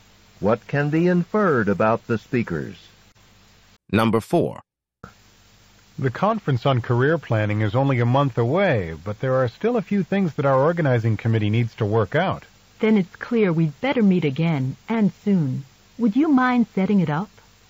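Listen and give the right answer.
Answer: Set up another committee meeting soon.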